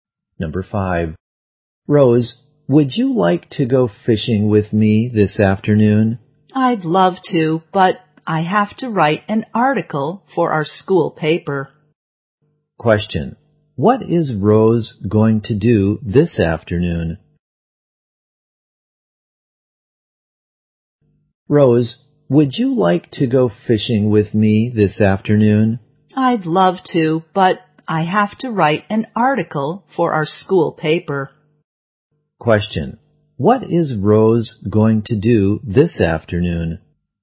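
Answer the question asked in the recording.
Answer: Write an article for the school paper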